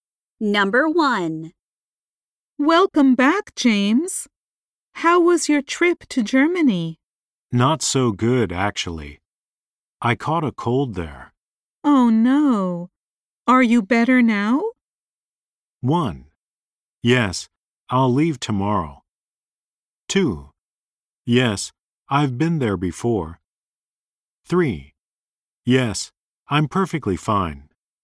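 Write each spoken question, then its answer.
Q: Oh no. Are you better now?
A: 3: Yes, I'm perfectly fine.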